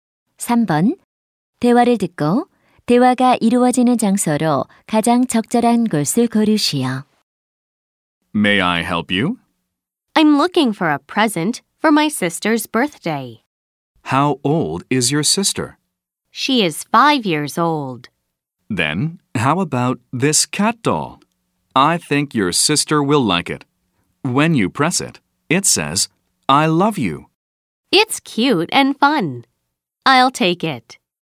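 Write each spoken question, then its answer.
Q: 대화를 듣고 대화가 이루어지는 장소로 가장 적절한 곳을 고르시오.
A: 장난감 가게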